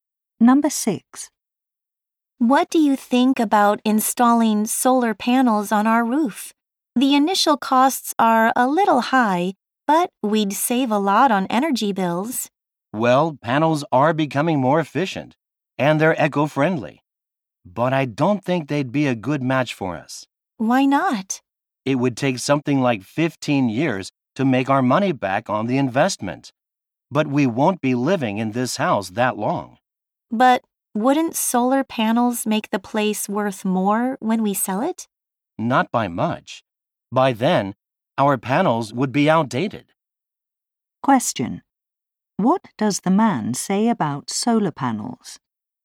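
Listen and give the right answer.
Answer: They would not pay for themselves before the couple moves.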